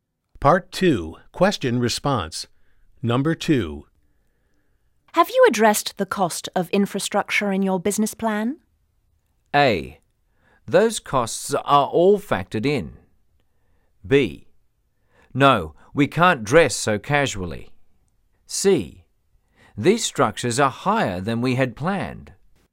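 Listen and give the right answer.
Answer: A: Those costs are all factored in.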